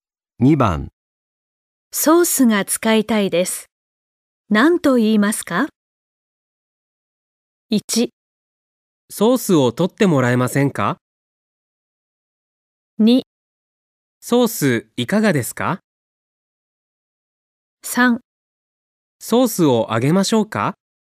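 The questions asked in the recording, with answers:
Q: ソースが使いたいです。何と言いますか?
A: 1: ソースを取ってもらえませんか?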